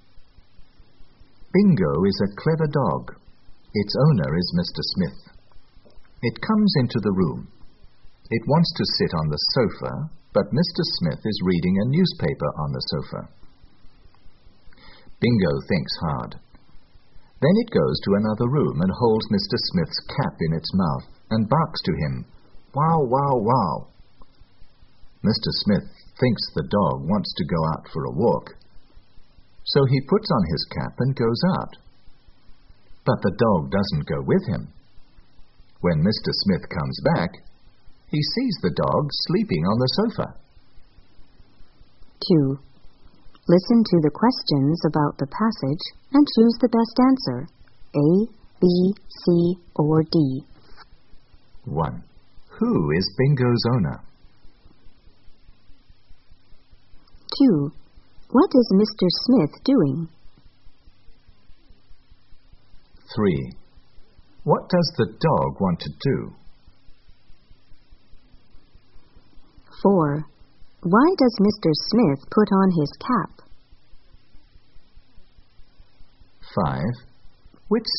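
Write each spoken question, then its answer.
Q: Who is Bingo's owner?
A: Mr. Smith

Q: What is Mr. Smith doing?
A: Reading a newspaper on the sofa

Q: What does the dog want to do?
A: Sit on the sofa

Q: Why does Mr. Smith put on his cap?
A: He thinks the dog wants to go out for a walk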